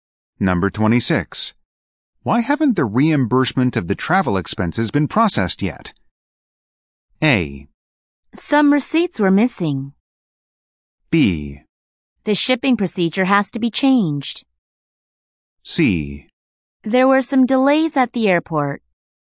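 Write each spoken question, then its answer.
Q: Why haven't the reimbursement of the travel expenses been processed yet?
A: A: Some receipts were missing.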